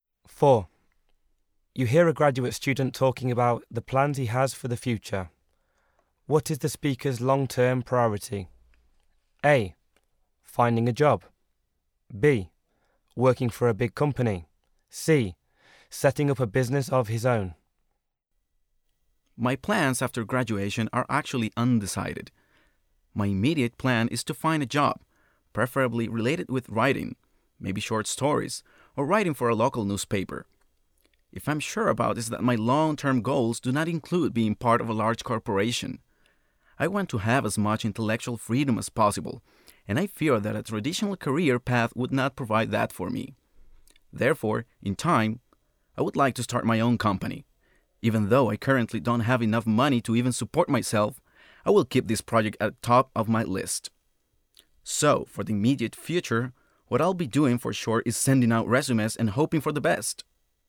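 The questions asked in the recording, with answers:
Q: What is the speaker's long-term priority?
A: C: Setting up a business of his own.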